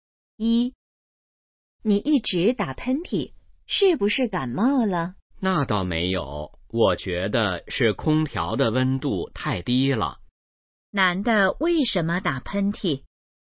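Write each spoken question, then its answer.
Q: 男的为什么打喷嚏?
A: 空调的温度太低了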